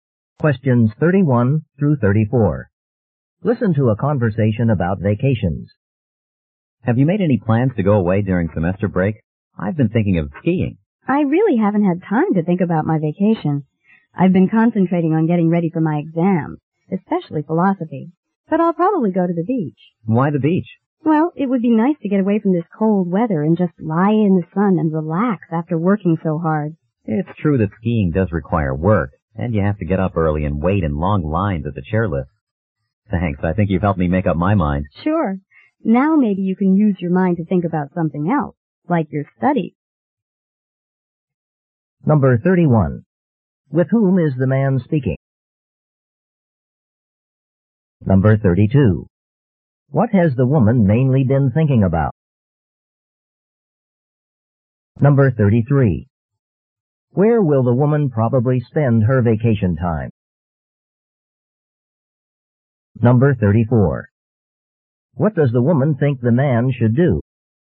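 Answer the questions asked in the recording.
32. Getting ready for her exams, especially philosophy
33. At the beach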